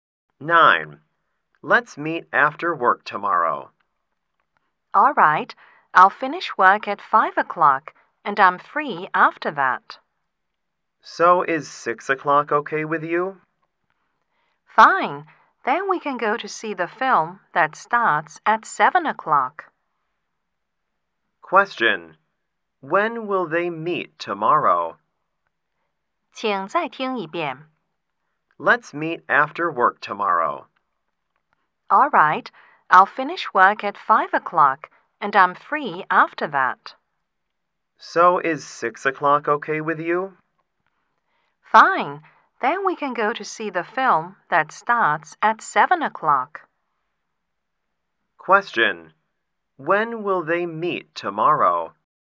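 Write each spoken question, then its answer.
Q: When will they meet tomorrow?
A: At 6 o'clock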